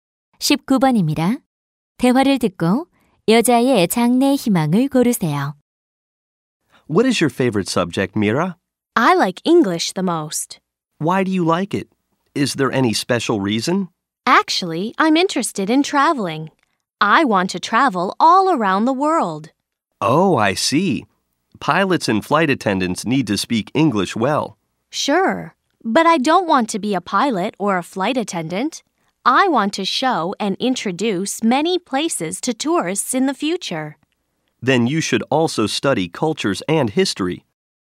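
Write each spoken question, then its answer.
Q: 대화를 듣고 여자의 장래 희망을 고르세요.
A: 관광 가이드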